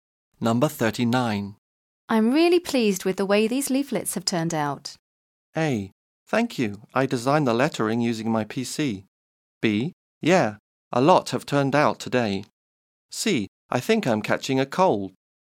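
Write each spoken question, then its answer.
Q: I'm really pleased with the way these leaflets have turned out.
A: A: Thank you. I designed the lettering using my PC.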